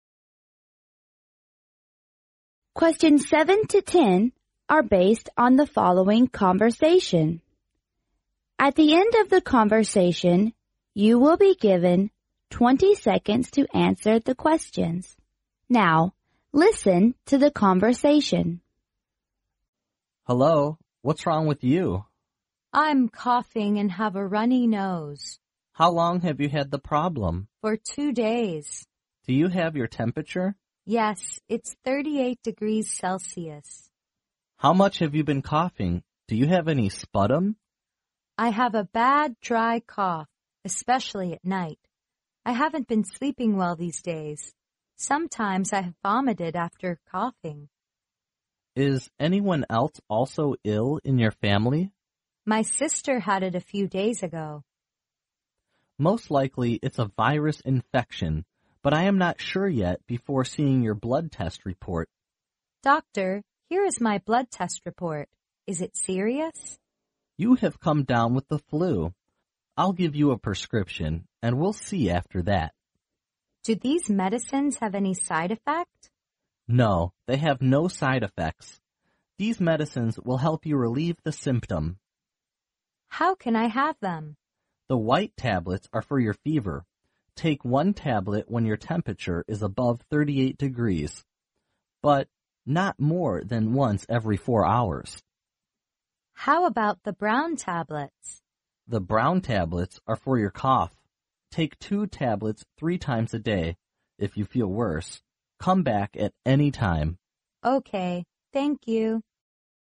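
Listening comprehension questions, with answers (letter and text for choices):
Now,listen to the conversation.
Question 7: Which of the following is NOT the symptom of the woman?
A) Coughing.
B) Vomiting after sleep.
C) Running nose.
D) Not sleeping well.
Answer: B) Vomiting after sleep.

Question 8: The doctor is not sure about the woman's illness before seeing her_____.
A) temperature report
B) virus infection report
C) blood test report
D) side effect report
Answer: C) blood test report

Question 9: Which of the following is INCORRECT?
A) The woman is infected with the flu.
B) The woman's symptom will be relieved with the medicine.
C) The woman should take one white tablet when her temperature is above 38°C.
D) The woman should have two white tablets three times a day.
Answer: D) The woman should have two white tablets three times a day.

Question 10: What prescription does the doctor give to the woman?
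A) Taking two white tablets three times a day.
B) Taking brown tablets once every four hours.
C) White tablets for the fever and brown tablets for the cough.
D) Brown tablets for the fever and white tablets for the cough.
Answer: C) White tablets for the fever and brown tablets for the cough.

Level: 专业四级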